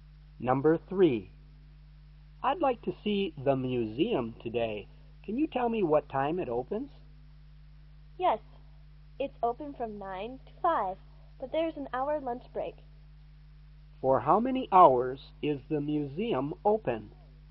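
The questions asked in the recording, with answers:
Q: For how many hours is the museum open?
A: 7 hours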